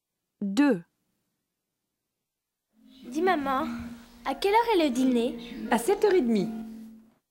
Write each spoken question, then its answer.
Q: Dis, maman, à quelle heure est le dîner?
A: 2, 7:30